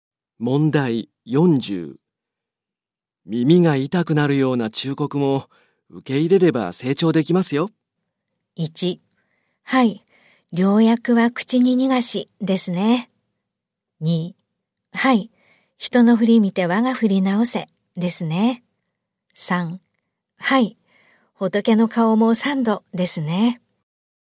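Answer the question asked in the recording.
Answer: 1: はい、良薬は口に苦しですね。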